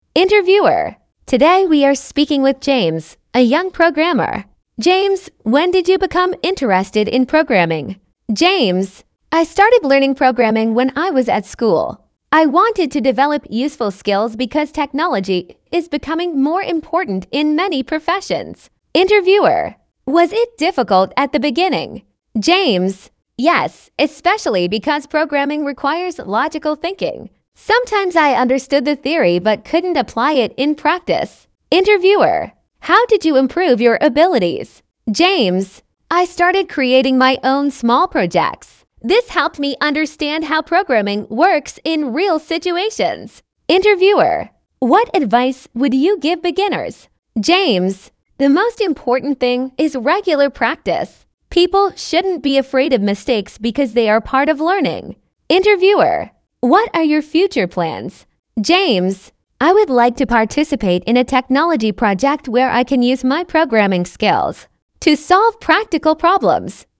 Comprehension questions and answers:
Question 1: Why did James start learning programming?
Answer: He wanted to develop useful skills for the future.

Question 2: What was the most difficult thing for James at the beginning?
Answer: Understanding complicated ideas.

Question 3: How does James usually improve his skills?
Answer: By creating his own projects.

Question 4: What advice does James give beginners?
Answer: Practise regularly and be patient.

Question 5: What is James planning to do in the future?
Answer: Work on a technology project.

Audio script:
Interviewer: Today we are speaking with James, a young programmer. James, when did you become interested in programming?
James: I started learning programming when I was at school. I wanted to develop useful skills because technology is becoming more important in many professions.
Interviewer: Was it difficult at the beginning?
James: Yes, especially because programming requires logical thinking. Sometimes I understood the theory but couldn't apply it in practice.
Interviewer: How did you improve your abilities?
James: I started creating my own small projects. This helped me understand how programming works in real situations.
Interviewer: What advice would you give beginners?
James: The most important thing is regular practice. People shouldn't be afraid of mistakes because they are part of learning.
Interviewer: What are your future plans?
James: I would like to participate in a technology project where I can use my programming skills to solve practical problems.

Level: 10 класса